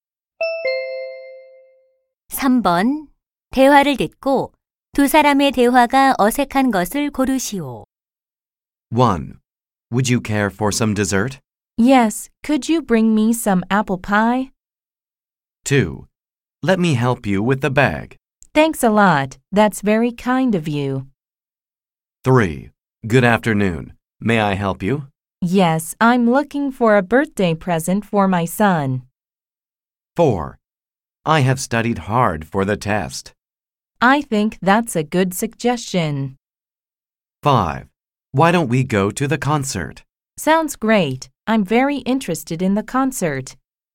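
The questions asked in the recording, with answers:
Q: 대화를 듣고 두 사람의 대화가 어색한 것을 고르시오.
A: 4: I have studied hard for the test. / I think that's a good suggestion.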